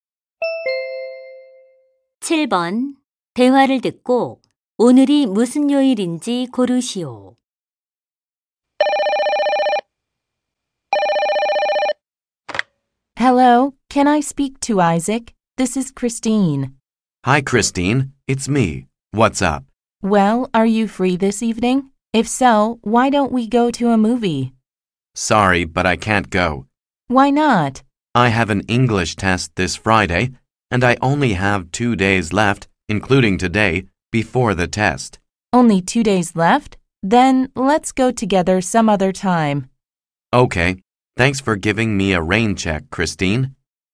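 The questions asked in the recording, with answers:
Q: 대화를 듣고 오늘이 무슨 요일인지 고르시오.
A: 목요일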